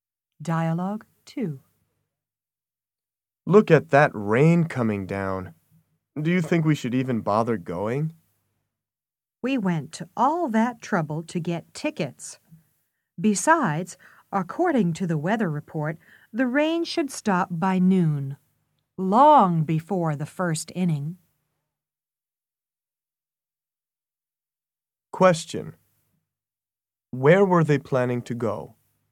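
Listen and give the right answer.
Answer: A baseball game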